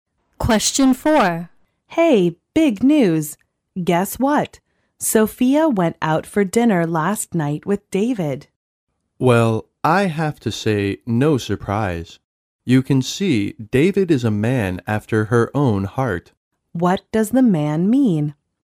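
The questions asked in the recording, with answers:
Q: What does the man mean?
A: He isn't surprised; David is just the kind of man Sophia likes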